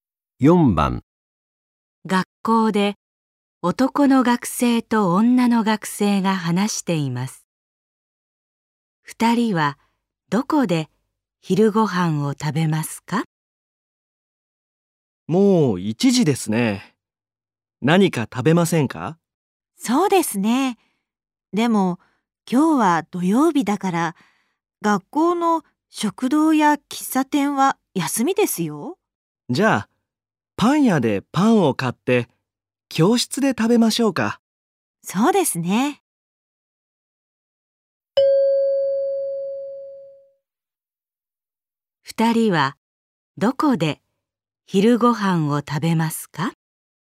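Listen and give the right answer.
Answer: 教室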